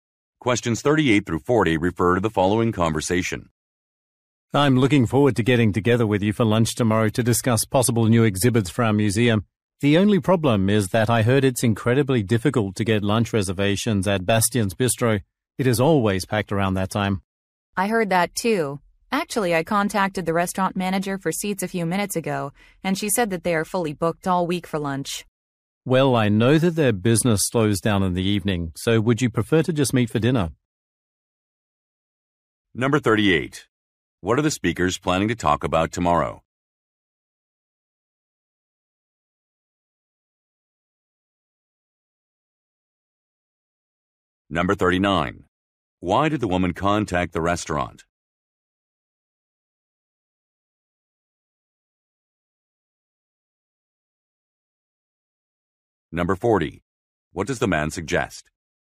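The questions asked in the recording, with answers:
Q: What are the speakers planning to talk about tomorrow?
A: Possible new exhibits for their museum

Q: Why did the woman contact the restaurant?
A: To reserve seats for lunch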